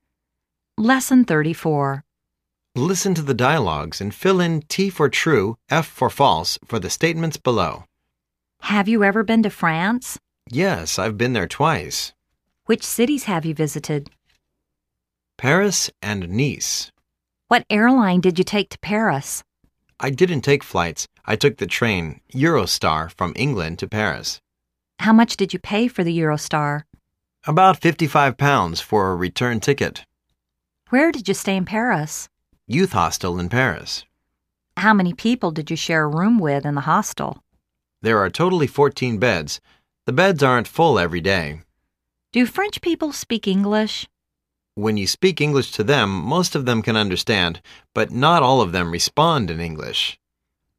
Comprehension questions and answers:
Listen to the dialogues and fill in T "True",F "False" for the statements below.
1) He's been to Nice in France.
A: True

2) He took the Eurostar airline to Paris.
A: False

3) The Eurostar ticket is about 55 US dollars.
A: False

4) He stayed in a 14-bed room in Youth Hostel at Paris.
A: True

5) All French people can speak and understand English very well.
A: False